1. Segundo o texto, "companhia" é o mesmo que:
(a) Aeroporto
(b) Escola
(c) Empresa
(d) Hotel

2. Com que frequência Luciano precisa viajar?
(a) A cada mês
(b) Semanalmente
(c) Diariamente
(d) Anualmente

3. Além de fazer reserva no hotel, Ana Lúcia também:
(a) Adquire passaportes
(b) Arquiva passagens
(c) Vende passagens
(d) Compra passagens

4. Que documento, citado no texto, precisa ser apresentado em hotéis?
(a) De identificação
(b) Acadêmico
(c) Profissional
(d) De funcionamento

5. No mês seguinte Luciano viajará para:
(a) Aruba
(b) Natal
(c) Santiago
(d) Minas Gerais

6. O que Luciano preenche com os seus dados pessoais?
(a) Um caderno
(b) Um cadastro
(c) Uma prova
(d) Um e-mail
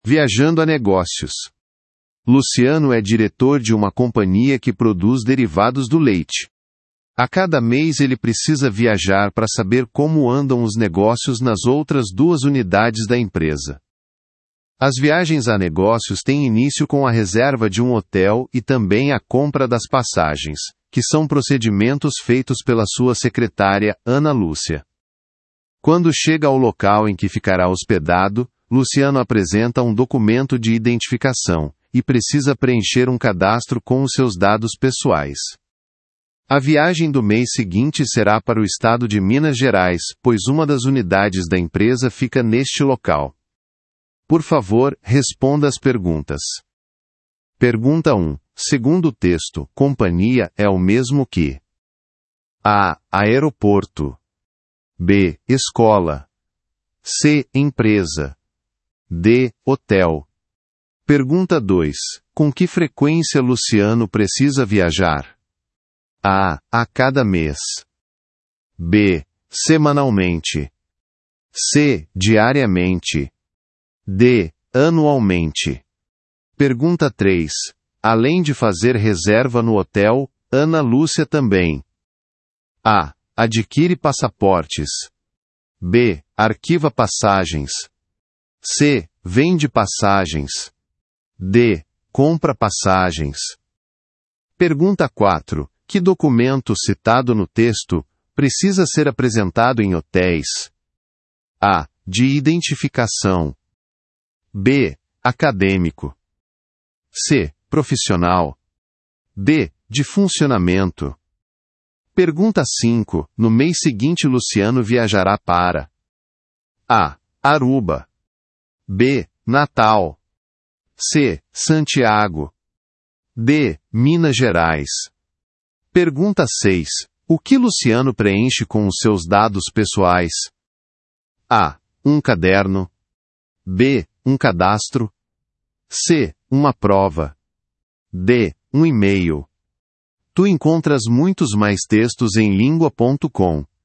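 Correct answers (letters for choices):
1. c
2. a
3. d
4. a
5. d
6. b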